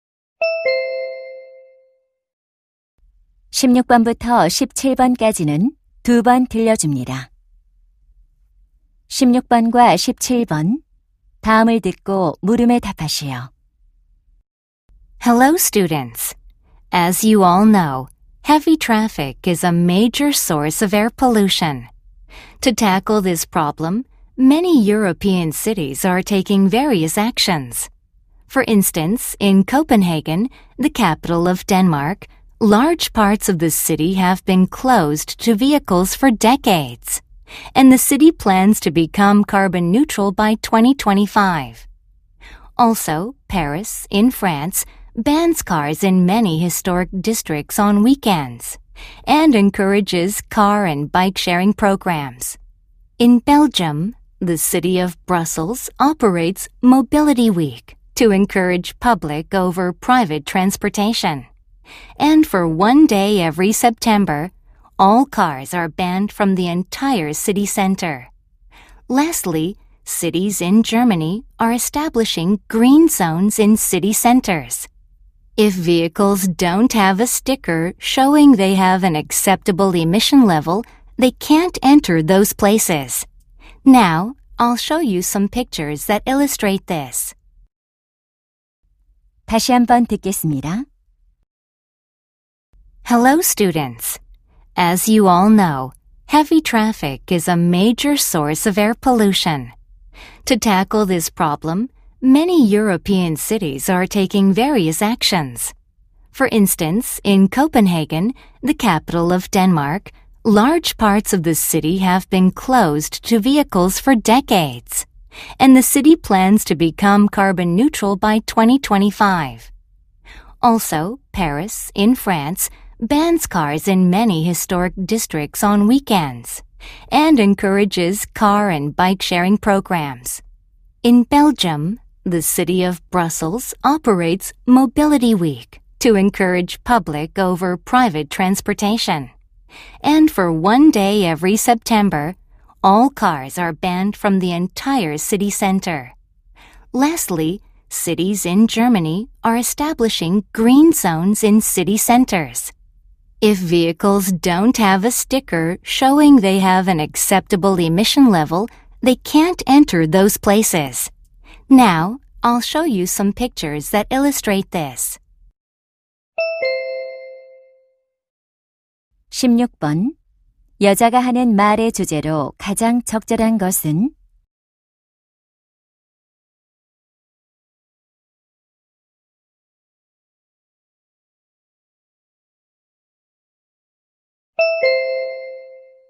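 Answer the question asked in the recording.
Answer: 대기 오염을 줄이기 위해 유럽 도시들이 차량 통행을 제한하는 조치들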